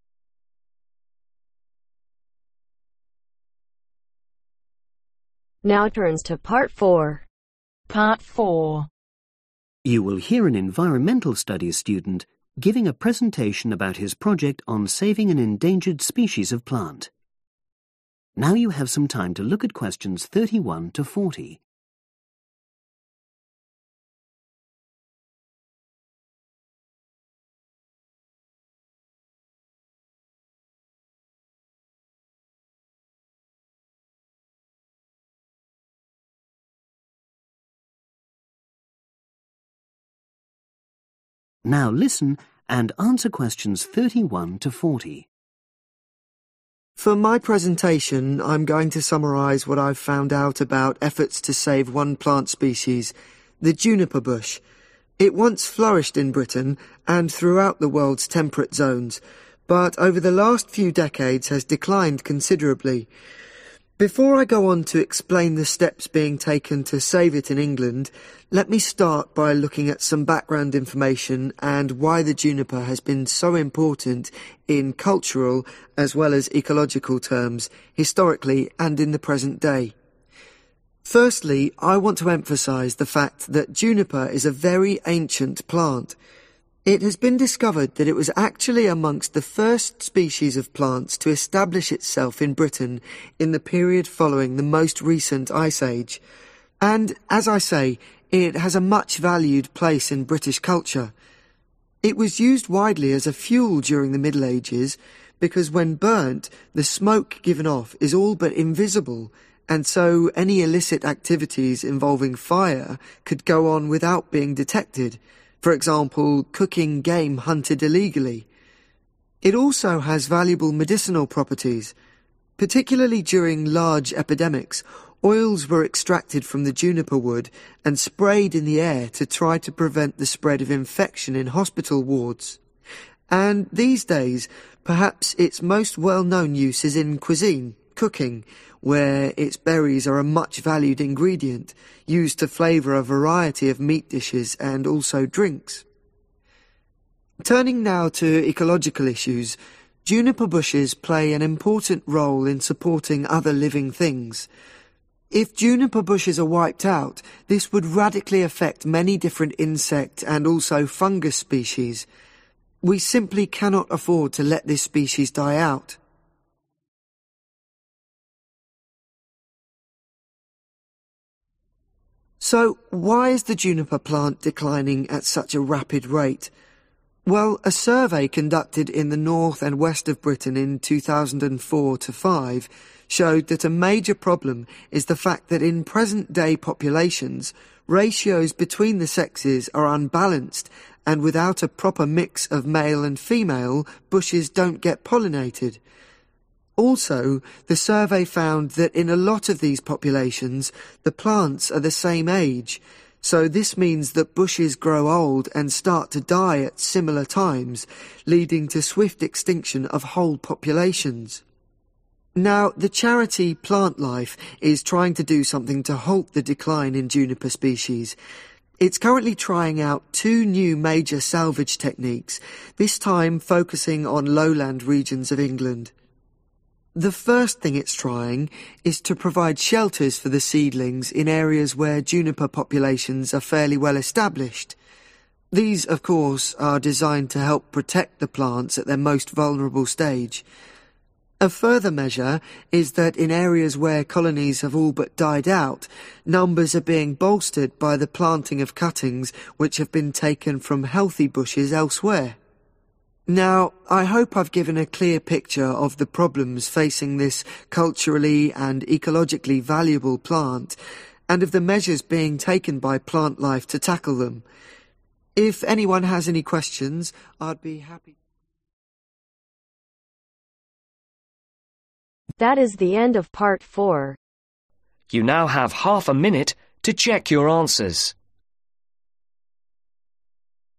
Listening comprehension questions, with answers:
Complete the information below. Write ONE WORD ONLY FOR each answer.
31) Juniper was one of the first plants to colonise Britain after the last ............ age.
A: ICE

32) Its smoke is virtually .............. , so juniper wood was used as fuel in illegal activities.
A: Invisible

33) Oils from the plant were used to prevent .............. spreading.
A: Infection(s)

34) Nowadays, its berries are widely used to .............. food and drink.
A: Flavour

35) Juniper plants also support several species of insects and .............. .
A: Fungus/ Fungi

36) In current juniper populations , rations of the ................ are poor.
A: Sexes

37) The bushes in each group are of the same age so ............... of whole populations is rapid.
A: Extinction

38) Plant-life is trialling novel techniques across ............... areas of England.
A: Lowland

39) One measure is to introduce ................ for seedlings.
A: Shelter (s)

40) A further step is to plant ................. from healthy bushes.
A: Cuttings